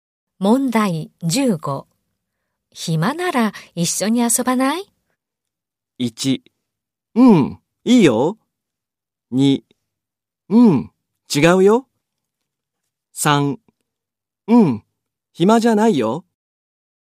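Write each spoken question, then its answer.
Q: 暇なら一緒に遊ばない?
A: 1: うん、いいよ。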